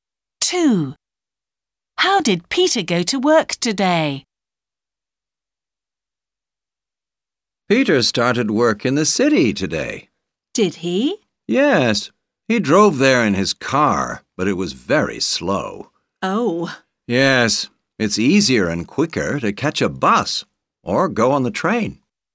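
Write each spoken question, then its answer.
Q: How did Peter go to work today?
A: By car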